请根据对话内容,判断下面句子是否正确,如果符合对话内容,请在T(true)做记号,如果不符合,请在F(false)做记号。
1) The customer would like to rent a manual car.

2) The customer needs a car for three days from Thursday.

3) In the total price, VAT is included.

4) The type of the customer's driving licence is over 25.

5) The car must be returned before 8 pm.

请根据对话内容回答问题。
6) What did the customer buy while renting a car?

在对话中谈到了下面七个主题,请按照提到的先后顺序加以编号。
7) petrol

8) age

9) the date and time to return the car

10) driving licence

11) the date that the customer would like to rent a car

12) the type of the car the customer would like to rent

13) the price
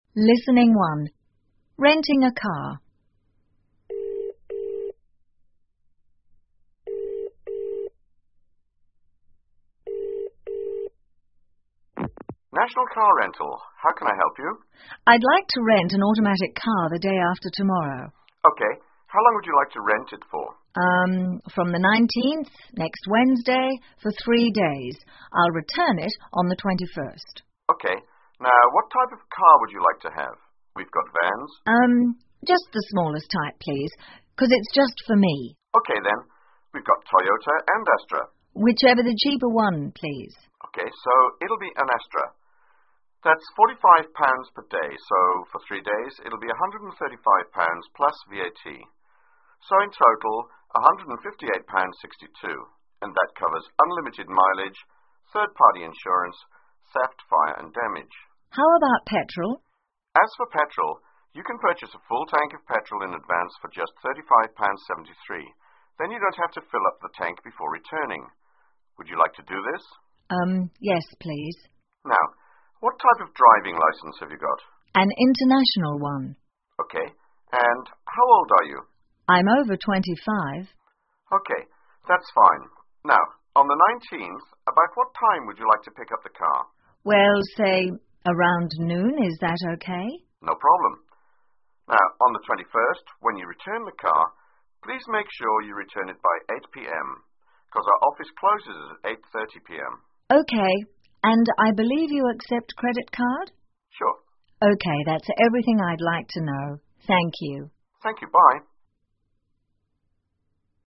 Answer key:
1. F
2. F
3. T
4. F
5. T
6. (A full tank of) Petrol
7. 4
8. 6
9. 7
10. 5
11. 1
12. 2
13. 3